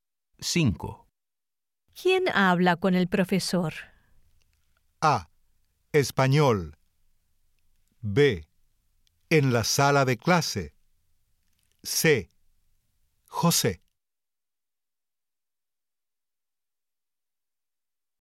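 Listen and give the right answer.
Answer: C: José.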